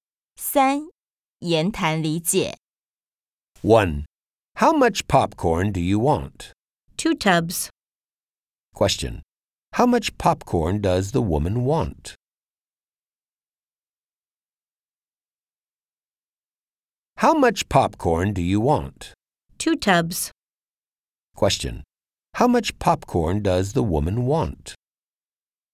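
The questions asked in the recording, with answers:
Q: How much popcorn does the woman want?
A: 2 tubs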